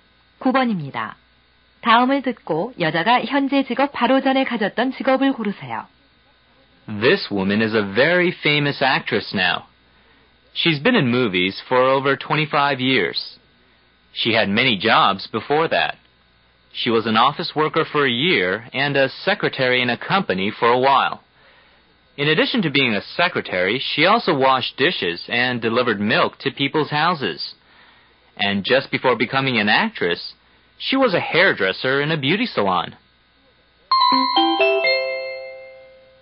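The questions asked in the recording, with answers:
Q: 다음을 듣고 여자가 현재 직업 바로 전에 가졌던 직업을 고르세요.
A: 미용사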